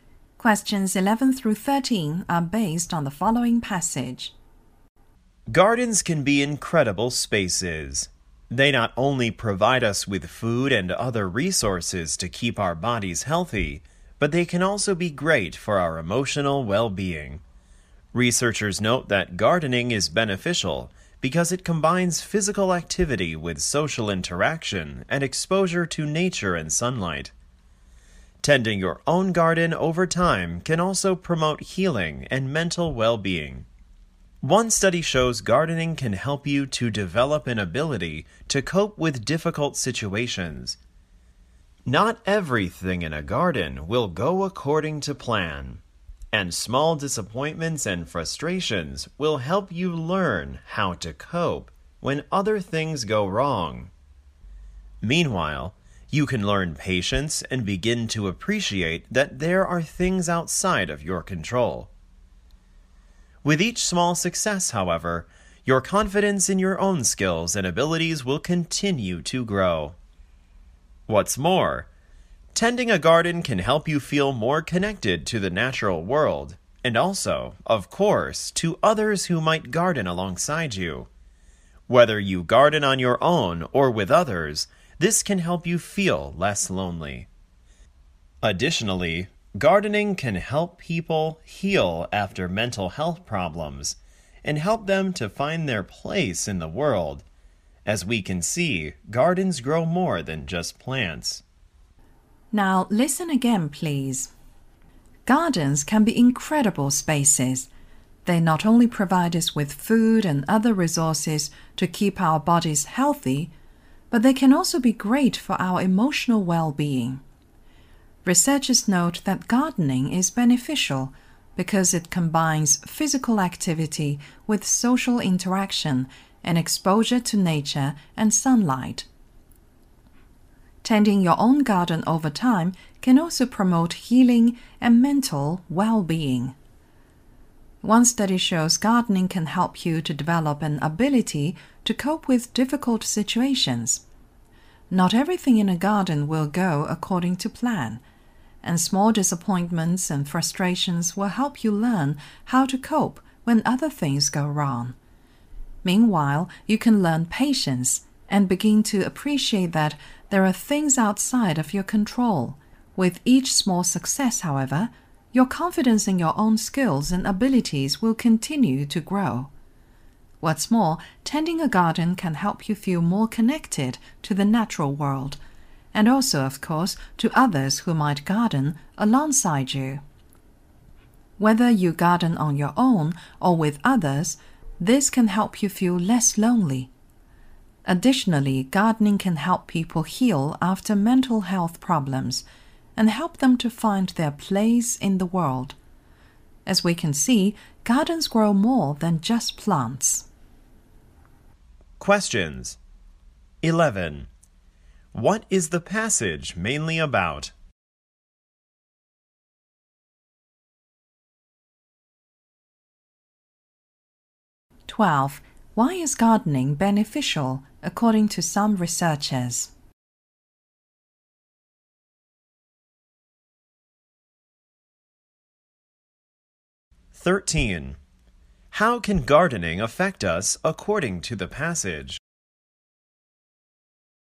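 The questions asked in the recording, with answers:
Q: What is the passage mainly about?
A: The benefits of gardening for our well-being

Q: Why is gardening beneficial, according to some researchers?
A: It combines physical activity with social interaction and exposure to nature and sunlight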